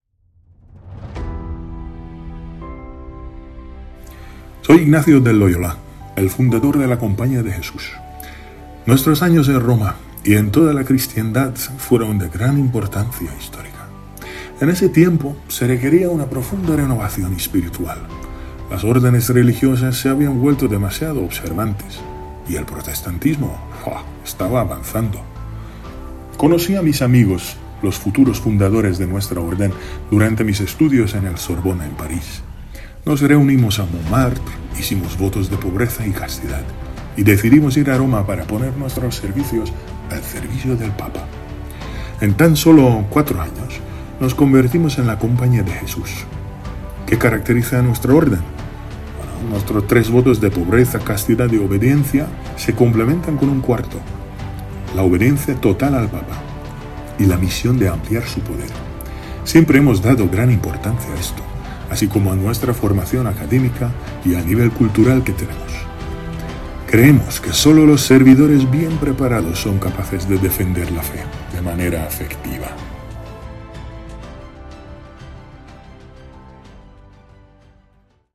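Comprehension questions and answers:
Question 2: Dónde estudió San Francisco de Loyola y conoció a muchos de los fundadores de la orden jesuita?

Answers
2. En la Sorbona, en París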